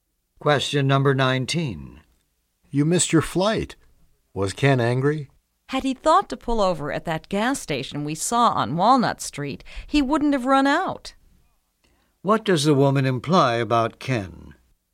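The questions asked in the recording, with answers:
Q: What does the woman imply about Ken?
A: Ken ran out of gas because he didn't stop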